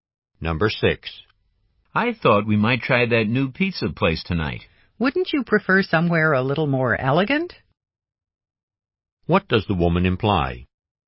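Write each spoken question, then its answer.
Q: What does the woman imply?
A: She would prefer a more elegant restaurant than the pizza place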